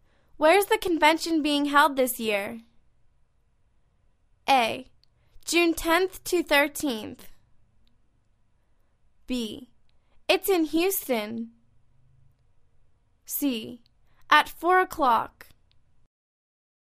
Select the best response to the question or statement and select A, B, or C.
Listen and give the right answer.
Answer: It's in Houston.